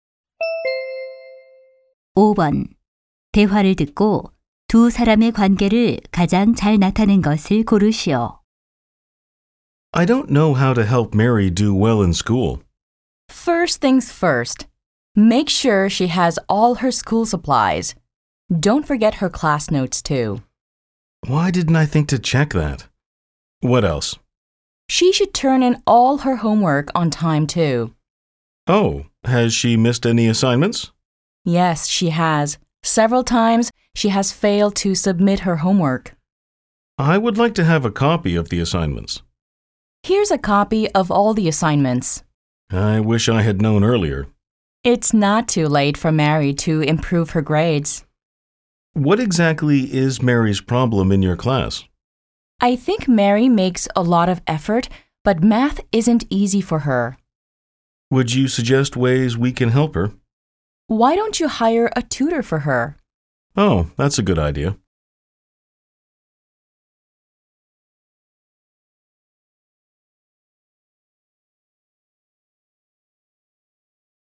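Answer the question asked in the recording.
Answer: 학부모 - 수학 교사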